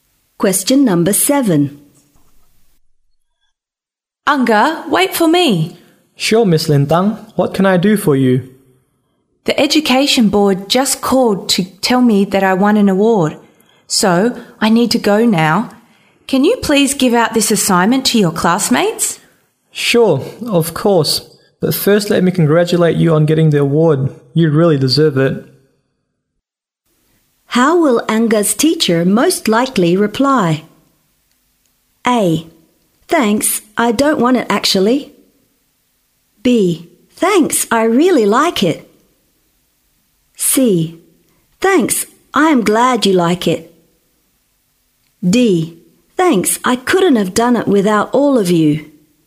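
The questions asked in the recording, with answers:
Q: How will Anga's teacher most likely reply?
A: D: Thanks, I couldn't have done it without all of you.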